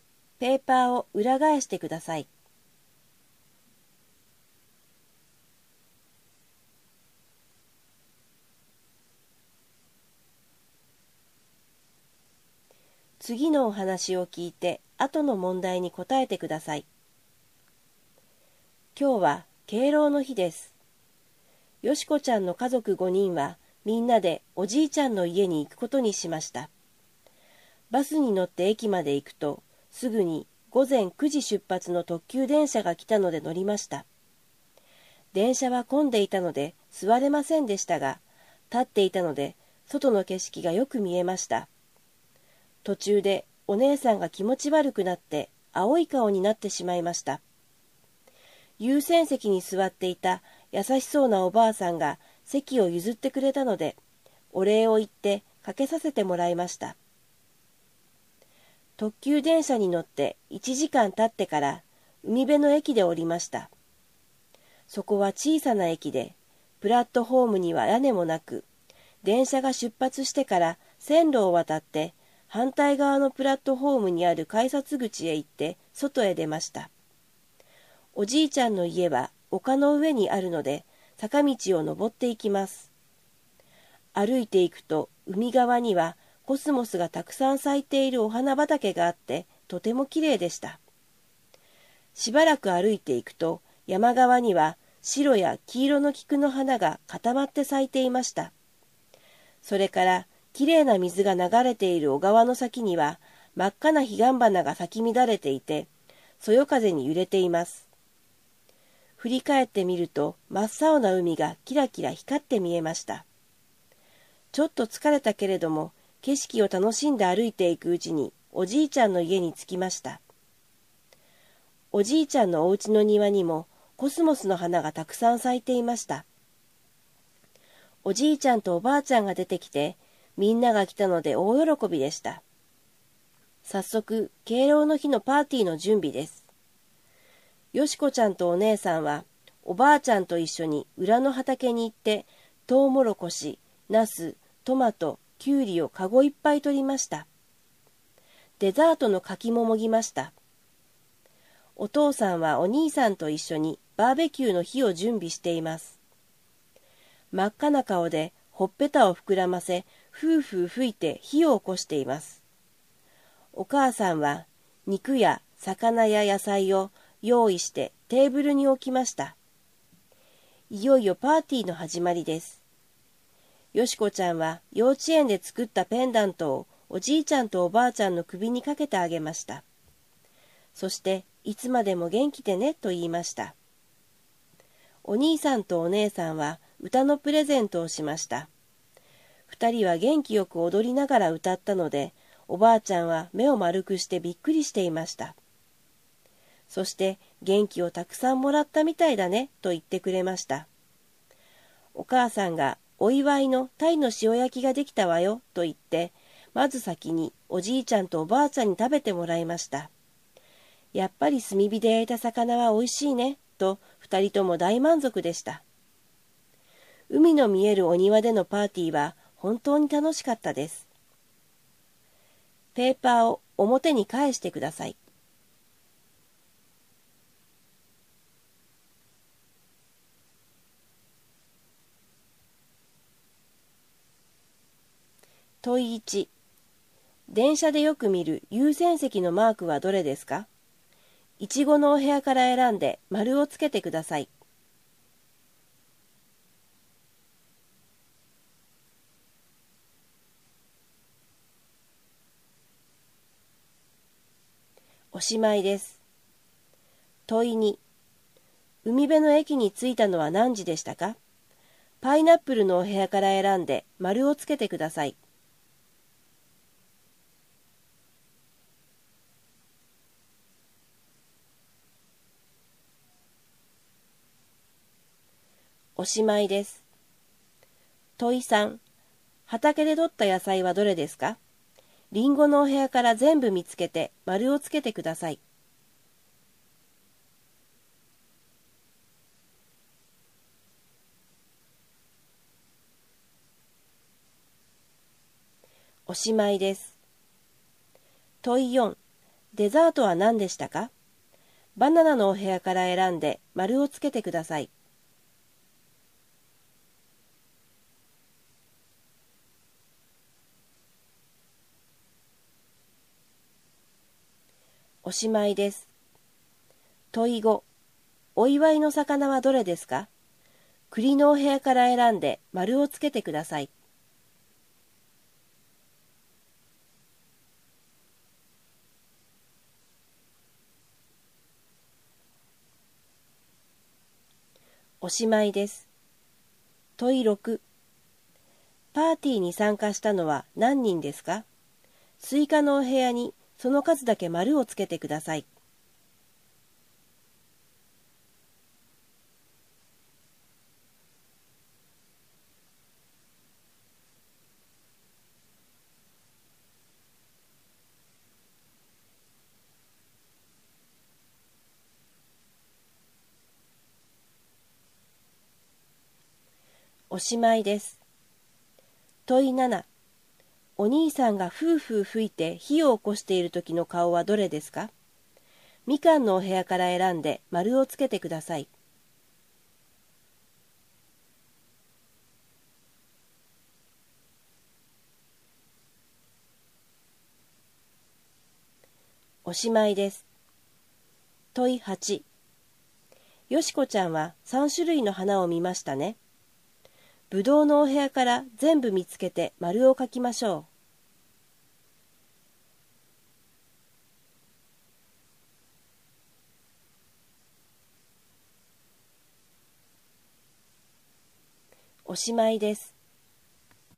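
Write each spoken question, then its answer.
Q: 海辺の駅に着いたのは何時でしたか?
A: 午前10時

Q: 畑で採った野菜はどれですか?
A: トウモロコシ、ナス、トマト、きゅうり

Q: パーティーに参加したのは何人ですか?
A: 7人

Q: よしこちゃんは3種類の花を見ましたね。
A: コスモス、菊、彼岸花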